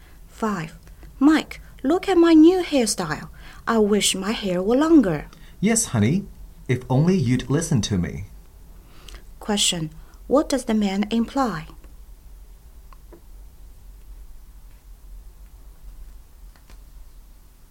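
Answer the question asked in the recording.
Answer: She should have listened to his advice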